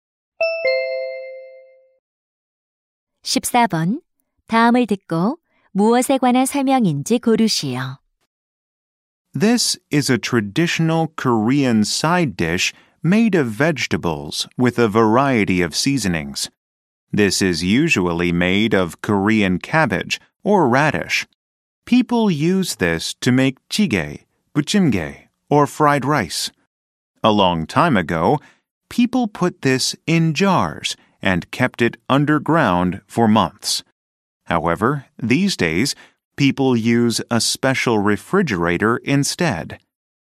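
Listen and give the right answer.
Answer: 김치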